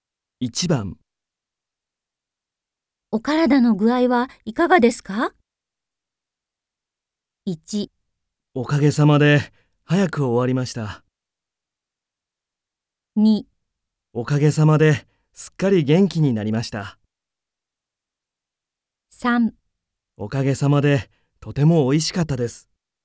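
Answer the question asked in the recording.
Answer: 2: おかげさまで、すっかり元気になりました。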